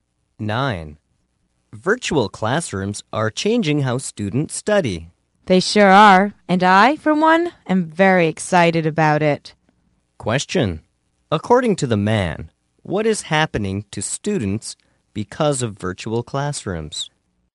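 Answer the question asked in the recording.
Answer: The way they study is changing.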